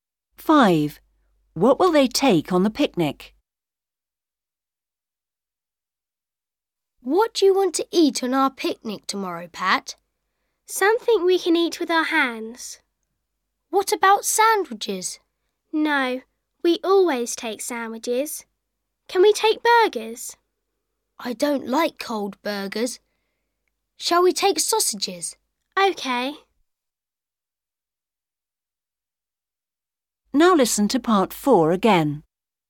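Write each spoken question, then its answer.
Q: What will they take on the picnic?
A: sausages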